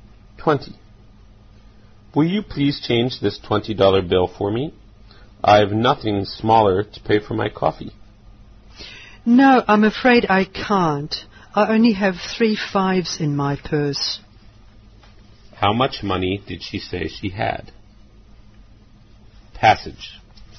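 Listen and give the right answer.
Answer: $15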